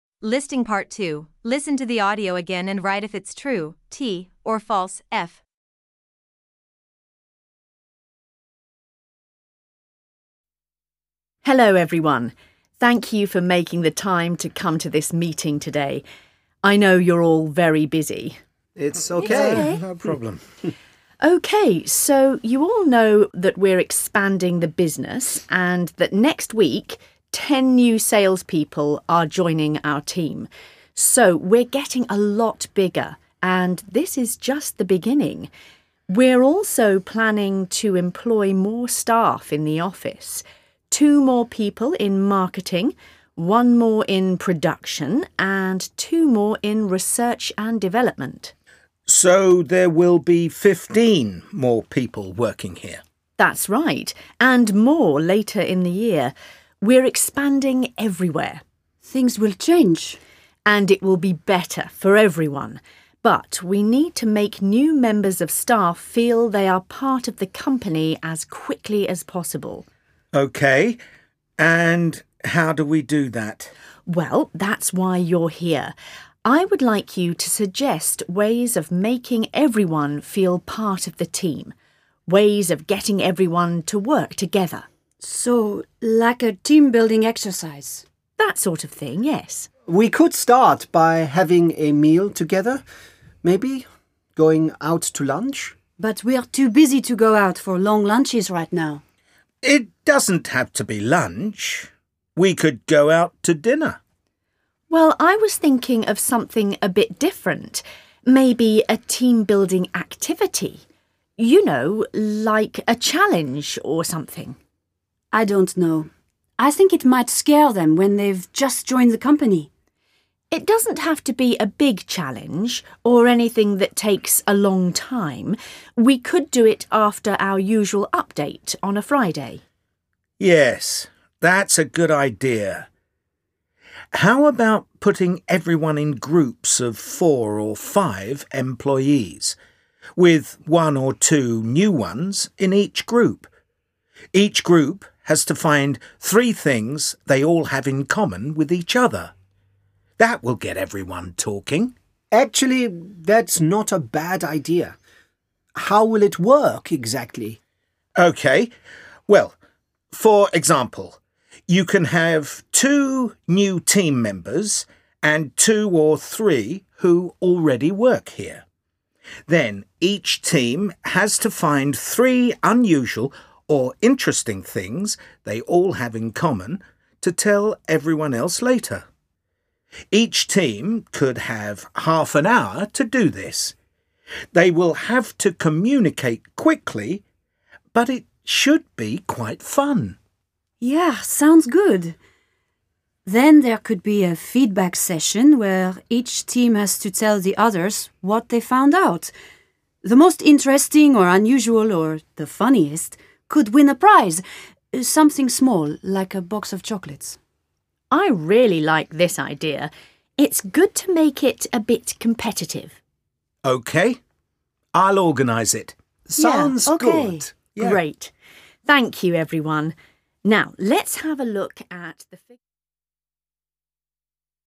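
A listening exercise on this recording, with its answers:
Part 2: Listen to the audio again and write if it's True (T) or False (F) ( 1.5 pts)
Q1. There will be more new people in the sales department than in the office.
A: T

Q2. There won't be any new people in the production department.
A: F

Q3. The company may hire more staff in the near future.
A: T

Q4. The manager also asks participants to say which departments they think need more staff.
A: F

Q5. The manager suggests holding the team-building activity at the weekend.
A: F

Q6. The team-building activity isn't going to be competitive.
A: F

Part 1: Listen to the audio and choose the correct option:( 1.5 pts)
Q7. How many new employees are joining the sales team?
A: 10

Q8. How many new people will be employed in marketing?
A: 2

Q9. How many employees are joining the research and development team?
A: 2

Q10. In the team-building activity, how many things do the employees in each group have to find in common?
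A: 3

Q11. How long will each team have to complete the team-building activity?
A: 30 minutes

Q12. What prize could they win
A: a box of chocolates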